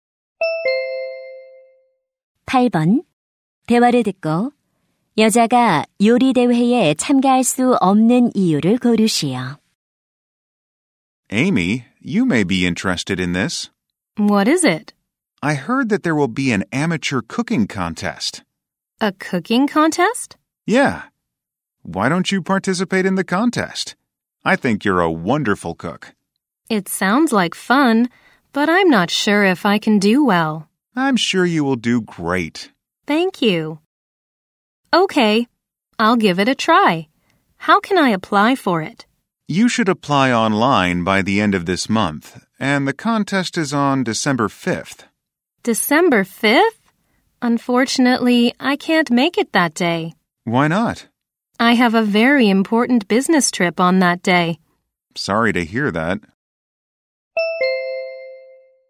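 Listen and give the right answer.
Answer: 중요한 출장이 있어서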